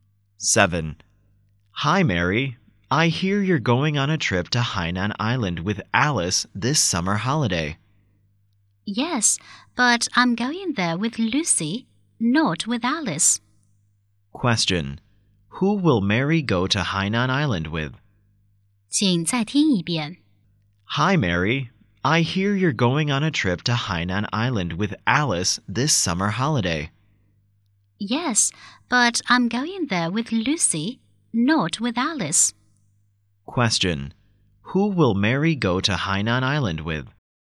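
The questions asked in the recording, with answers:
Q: Who will Mary go to Hainan Island with?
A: With Lucy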